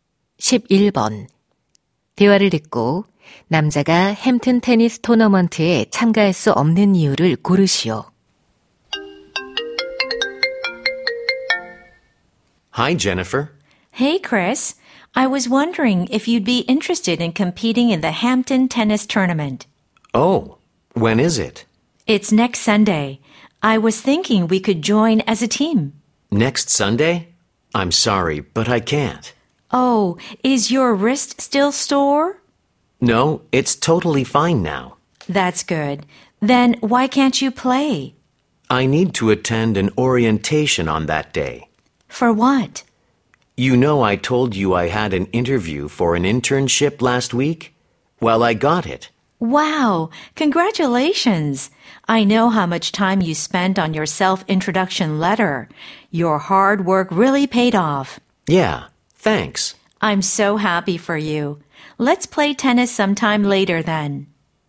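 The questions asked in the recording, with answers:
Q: 대화를 듣고 남자가 햄튼 테니스 토너먼트에 참가할 수 없는 이유를 고르시오.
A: 인턴십 오리엔테이션에 참석해야 해서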